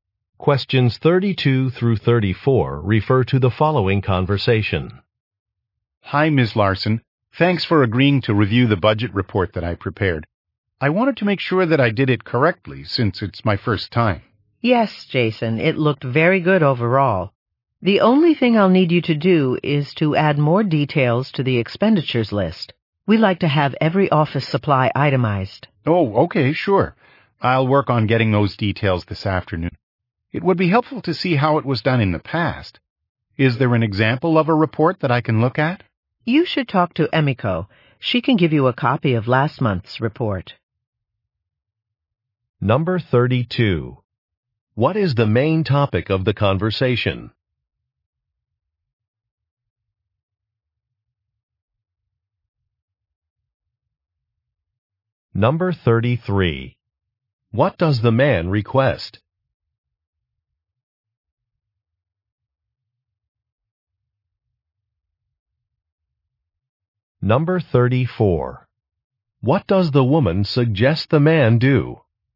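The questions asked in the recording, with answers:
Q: What is the main topic of the conversation?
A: A budget report

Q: What does the man request?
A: An example of a past report

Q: What does the woman suggest the man do?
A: Talk to Emiko for last month's report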